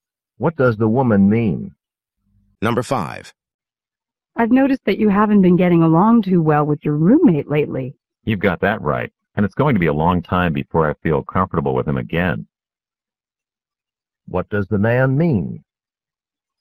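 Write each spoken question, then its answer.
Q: What does the man mean?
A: He is still upset with his roommate and it will take a long time to get over it.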